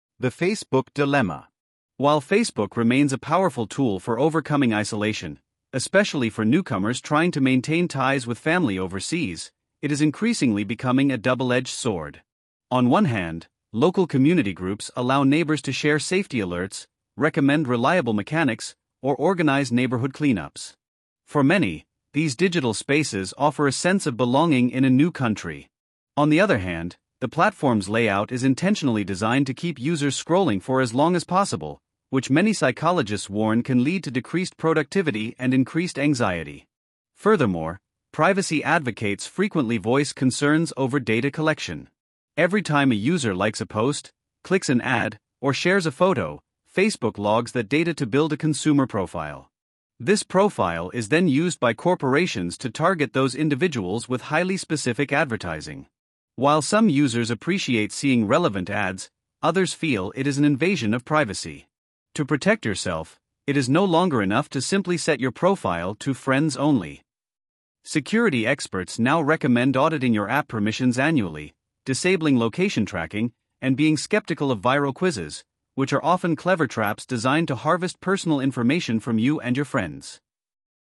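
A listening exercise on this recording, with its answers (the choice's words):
II. Read the following questions and choose the correct answer:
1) What is the speaker's primary purpose in this passage?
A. To convince the audience to delete their social media accounts.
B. To provide a balanced analysis of the benefits and drawbacks of Facebook.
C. To advertise new privacy software to computer students.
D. To explain the history of how families stay connected overseas.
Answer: To provide a balanced analysis of the benefits and drawbacks of Facebook.

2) What does the phrase "double-edged sword" imply about Facebook?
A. It is a dangerous tool that should only be used by experts.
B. It has both positive benefits and negative consequences.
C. It is an old-fashioned platform that is losing popularity.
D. It requires two people to set up an account properly.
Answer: It has both positive benefits and negative consequences.

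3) Based on the script, how might a local Facebook group benefit a newcomer to Canada?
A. It can help them find a job with the Canadian government.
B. It can provide them with free international calling cards.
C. It can help them feel more integrated into their local community.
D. It can automatically translate English into their native language.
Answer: It can help them feel more integrated into their local community.

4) What can be inferred about the way Facebook is designed?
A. It is designed to be difficult to navigate for older adults.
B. The layout encourages users to spend more time on it than they intend to.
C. It was created primarily to help psychologists study human behavior.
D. The design changes completely depending on which country you are in.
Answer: The layout encourages users to spend more time on it than they intend to.

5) According to the speaker, what is the hidden cost of clicking a 'like' button or an advertisement?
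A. Your computer is at a higher risk of getting a virus.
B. You will be charged a small fee on your phone bill.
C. You are providing data that companies use to track your consumer habits.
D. Your friends will receive unwanted notifications.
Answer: You are providing data that companies use to track your consumer habits.

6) How does the speaker seem to feel about highly targeted corporate advertising?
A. They believe it is completely useless to all consumers.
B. They recognize that public opinion on it is divided.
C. They think it is the best feature Facebook has to offer.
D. They are worried it will cause a major economic crisis.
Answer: They recognize that public opinion on it is divided.

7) Why does the speaker suggest that changing your settings to "Friends Only" is insufficient?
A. Because your friends can still steal your password.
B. Because modern privacy threats go beyond who can see your photos.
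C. Because Facebook plans to eliminate the "Friends Only" option soon.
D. Because hackers can easily bypass that specific button.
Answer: Because modern privacy threats go beyond who can see your photos.

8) What does the speaker suggest about viral online quizzes?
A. They are a great way to practice English grammar.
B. They are usually created by local neighborhood groups.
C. They look harmless but are often used to gather user data.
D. They help improve your computer's processing speed.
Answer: They look harmless but are often used to gather user data.

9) What does the word "auditing" mean in the context of "auditing your app permissions"?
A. Deleting all apps from your smartphone.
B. Paying a professional to look at your phone.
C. Regularly checking and reviewing your settings.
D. Changing your password to a stronger one.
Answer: Regularly checking and reviewing your settings.

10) What is the overall tone of the speaker regarding the future of online privacy?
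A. Indifferent and bored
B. Overly optimistic and cheerful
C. Cautious and protective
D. Angry and aggressive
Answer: Cautious and protective

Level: High-Intermediate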